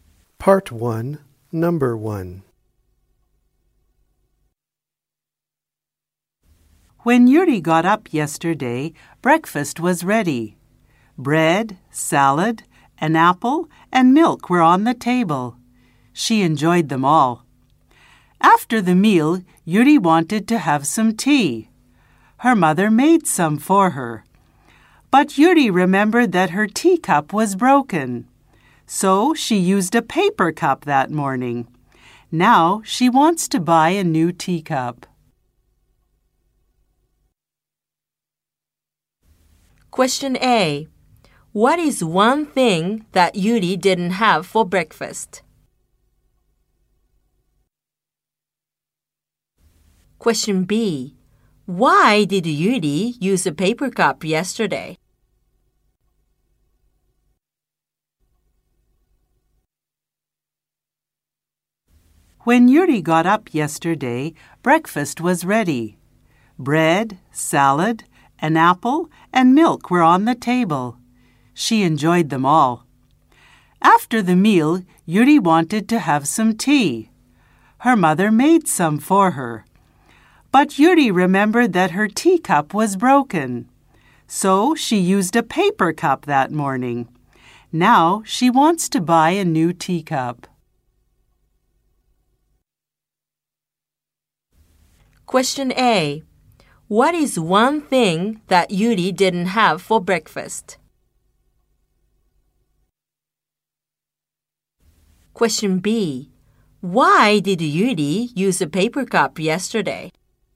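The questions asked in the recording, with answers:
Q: Why did Yuri use a paper cup yesterday?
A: Because her teacup was broken.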